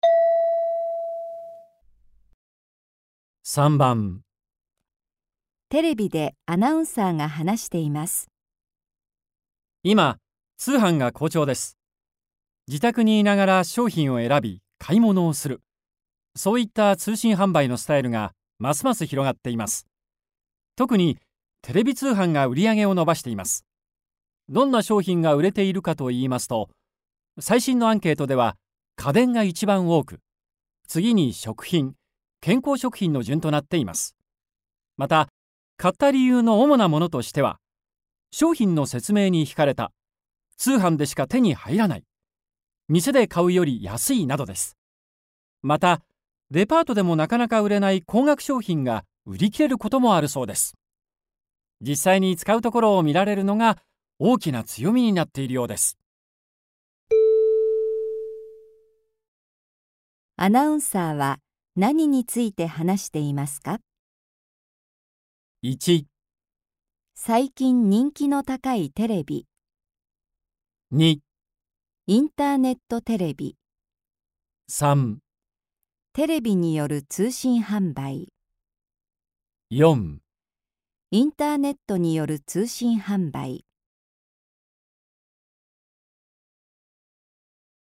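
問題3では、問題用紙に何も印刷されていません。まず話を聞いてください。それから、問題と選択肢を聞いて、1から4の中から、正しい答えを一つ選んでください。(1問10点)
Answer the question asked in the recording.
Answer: テレビによる通信販売

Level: N2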